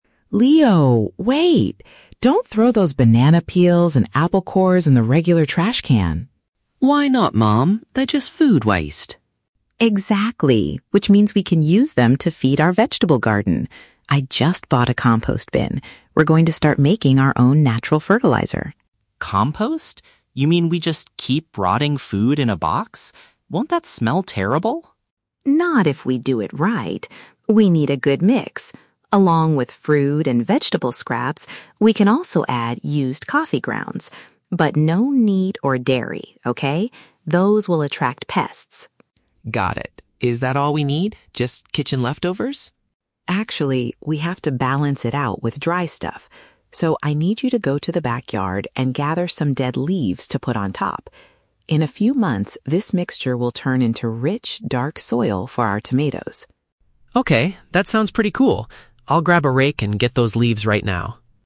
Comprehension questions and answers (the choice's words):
Listen to the conversation between a mother and her son, then choose the correct answer (A, B, or C) for each question.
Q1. What is the main reason the mother stops Leo from using the normal trash?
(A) She wants to save the kitchen scraps to help their plants grow.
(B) She is annoyed because the kitchen garbage bag is already full.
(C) She wants to give the leftover fruit to their family pets.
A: She wants to save the kitchen scraps to help their plants grow.

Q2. Which of the following items should NOT be placed in the new bin?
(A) Leftover material from making coffee.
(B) Animal products such as meat and milk.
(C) Plastic grocery bags and glass bottles.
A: Animal products such as meat and milk.

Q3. What task does Leo agree to do immediately after the conversation?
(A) Pick some ripe tomatoes from the garden.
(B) Take the kitchen garbage out to the street.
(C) Collect some dry plant material from outside.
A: Collect some dry plant material from outside.

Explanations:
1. The mother says they can use the food waste to "feed our vegetable garden" and make "natural fertilizer". Option (A) is a paraphrase of this idea. Option (B) is a plausible reason in real life but is never mentioned. Option (C) is a trap; she says "feed our vegetable garden", not pets. She also mentions "pests" (insects/rats), which might sound similar to "pets" to confuse the listener.
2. The mother clearly states, "But no meat or dairy, okay?" Milk is a dairy product. Option (A) is a trap; "used coffee grounds" are explicitly mentioned as something they can add, not something forbidden. Option (C) is plausible for general recycling rules, but it is not mentioned in this conversation at all.
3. The mother asks Leo to "go to the backyard and gather some dead leaves." Option (C) uses synonyms ("collect" for "gather", "dry plant material" for "dead leaves", "outside" for "backyard"). Option (A) is a trap; "tomatoes" are mentioned as the plants that will benefit in the future ("in a few months"), but he is not picking them now. Option (B) is a trap using the word "garbage/trash" mentioned at the beginning.

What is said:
Mom: Leo, wait! Don't throw those banana peels and apple cores in the regular trash can.
Leo: Why not, Mom? They're just food waste.
Mom: Exactly, which means we can use them to feed our vegetable garden. I just bought a compost bin. We're going to start making our own natural fertilizer.
Leo: Compost? You mean we just keep rotting food in a box? Won't that smell terrible?
Mom: Not if we do it right. We need a good mix. Along with fruit and vegetable scraps, we can also add used coffee grounds. But no meat or dairy, okay? Those will attract pests.
Leo: Got it. Is that all we need? Just kitchen leftovers?
Mom: Actually, we have to balance it out with dry stuff. So, I need you to go to the backyard and gather some dead leaves to put on top. In a few months, this mixture will turn into rich, dark soil for our tomatoes.
Leo: Okay, that sounds pretty cool. I'll grab a rake and get those leaves right now.